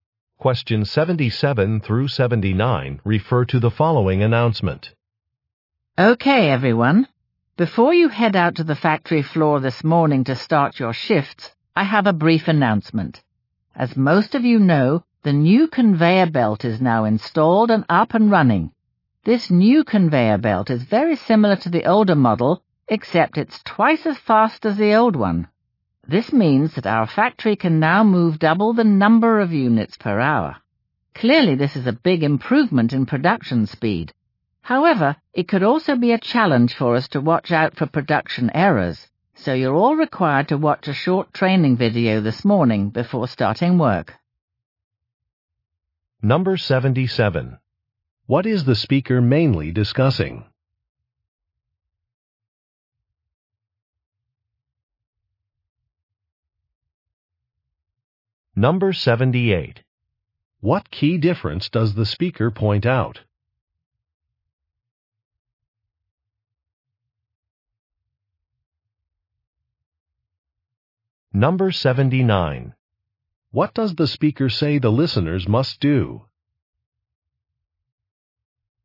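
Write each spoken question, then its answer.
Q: What is the speaker mainly discussing?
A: A new conveyor belt

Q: What key difference does the speaker point out?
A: It is twice as fast

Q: What does the speaker say the listeners must do?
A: Watch a short training video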